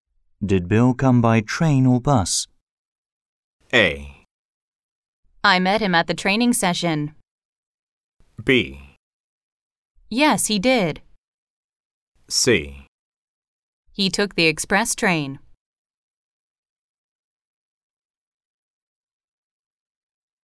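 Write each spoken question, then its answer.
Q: Did Bill come by train or bus?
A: C: He took the express train.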